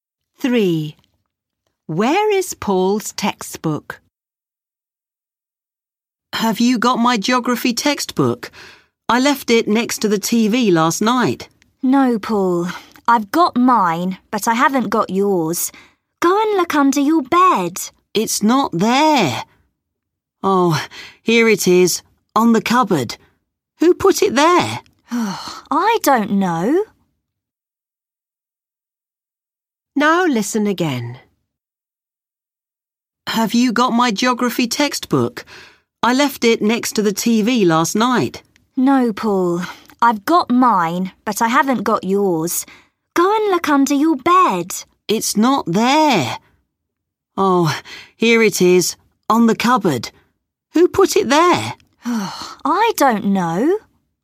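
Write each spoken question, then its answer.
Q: Where is Paul's textbook?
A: On the cupboard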